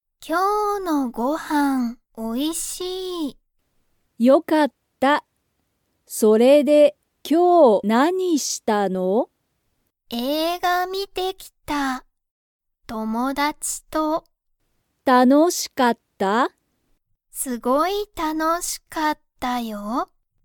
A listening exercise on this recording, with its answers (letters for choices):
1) 娘(むすめ)は、____と映画(えいが)を観(み)てきた。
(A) 自分(じぶん)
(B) ご飯(はん)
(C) 家族(かぞく)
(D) 友達(ともだち)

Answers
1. D

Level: Level 1